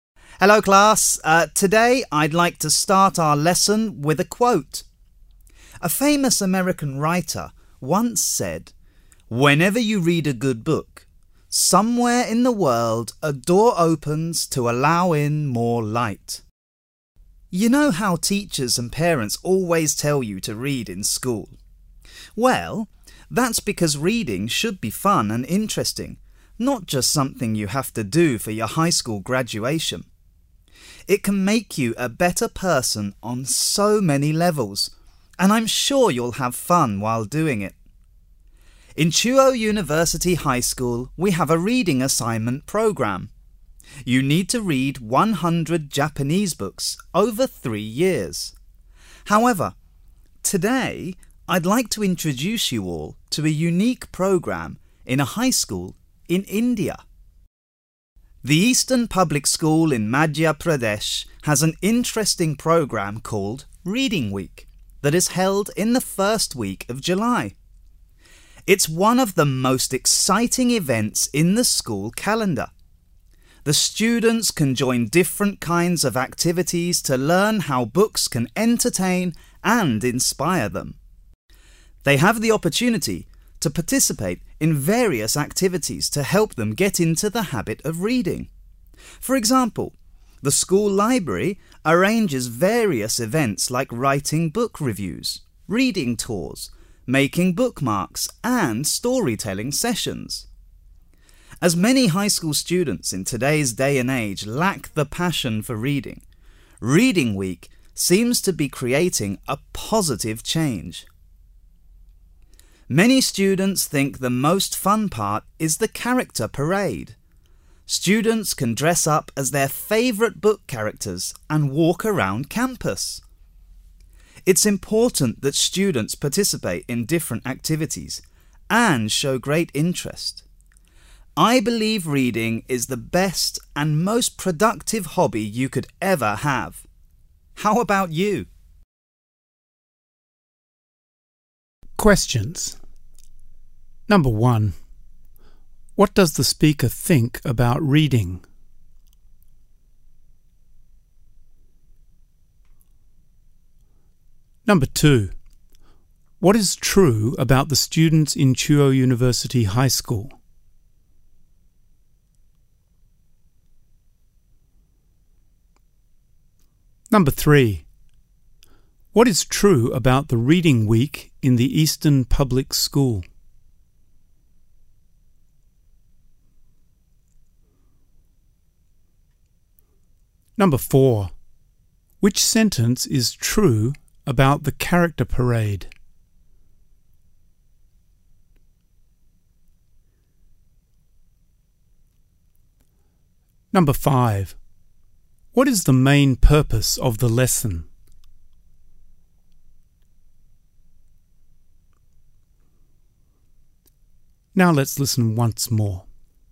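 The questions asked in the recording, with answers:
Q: What does the speaker think about reading?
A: Reading is the best and most productive hobby, and it should be fun and interesting

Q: What is true about the students in Chuo University High School?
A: They need to read 100 Japanese books over 3 years

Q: Which sentence is true about the character parade?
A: Students dress up as their favorite book characters and walk around campus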